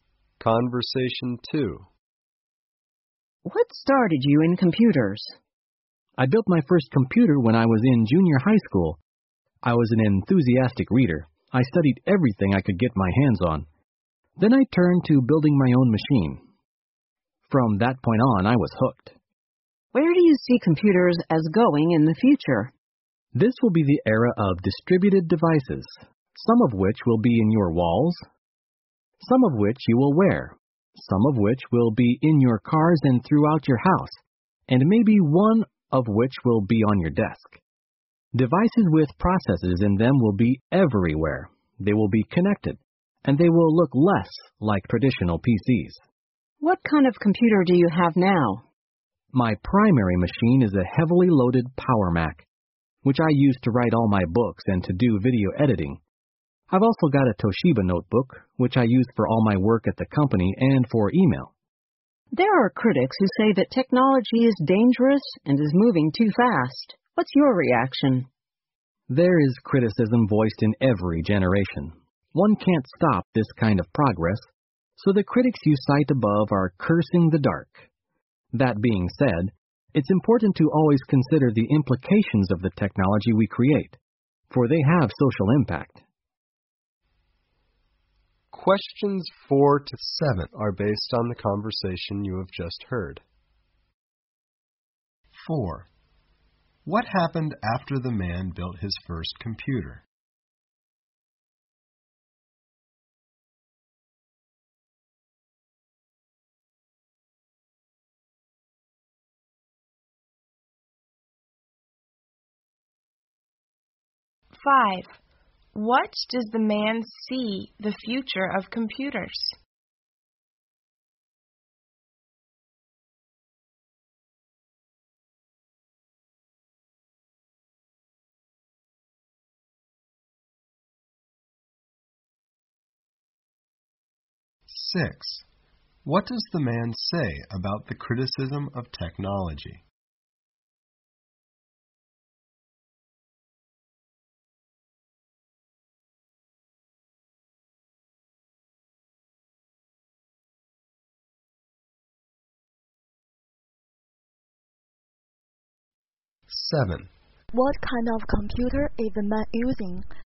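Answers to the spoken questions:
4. He became hooked on computers
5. Distributed, connected devices with processors everywhere
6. Progress can't be stopped, but its social implications should be considered
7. A heavily loaded Power Mac and a Toshiba notebook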